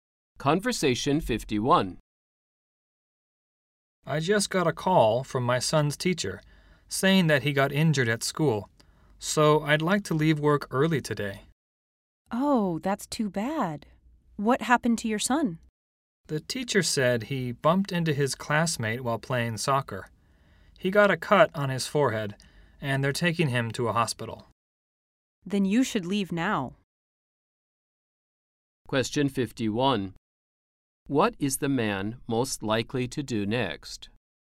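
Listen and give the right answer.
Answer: Leave work early to see his injured son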